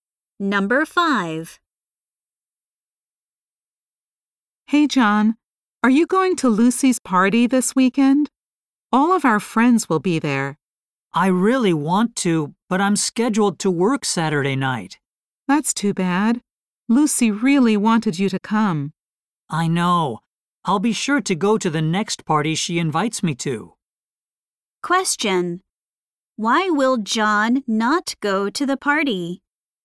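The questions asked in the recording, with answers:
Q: Why will John not go to the party?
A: He has to work Saturday night.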